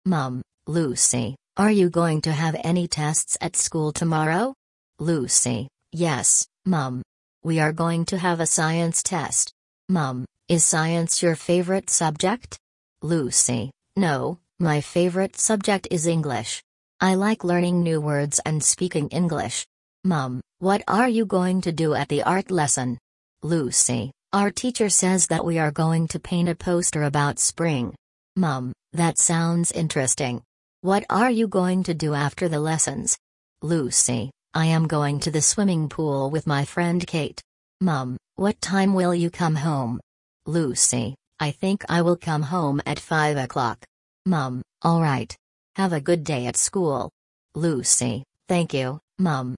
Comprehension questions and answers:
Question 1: Who is Lucy talking to?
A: Her mother.

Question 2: What subject is Lucy going to have a test in?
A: Science.

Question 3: What is Lucy's favourite subject?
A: English.

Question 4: What are the pupils going to do at the Art lesson?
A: Paint a poster.

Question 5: Where is Lucy going to go after the lessons?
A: To the swimming pool.

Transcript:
Mum: Lucy, are you going to have any tests at school tomorrow?
Lucy: Yes, Mum. We are going to have a Science test.
Mum: Is Science your favourite subject?
Lucy: No, my favourite subject is English. I like learning new words and speaking English.
Mum: What are you going to do at the Art lesson?
Lucy: Our teacher says that we are going to paint a poster about spring.
Mum: That sounds interesting. What are you going to do after the lessons?
Lucy: I am going to the swimming pool with my friend Kate.
Mum: What time will you come home?
Lucy: I think I will come home at five o'clock.
Mum: All right. Have a good day at school!

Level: 4 класс